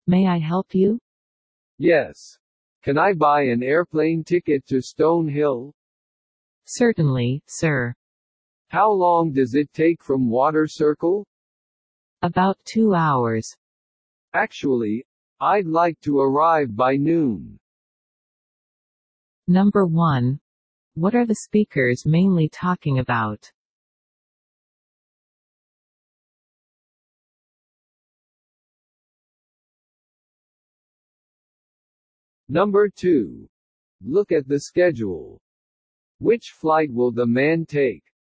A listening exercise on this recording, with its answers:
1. What are the speakers mainly talking about?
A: Time.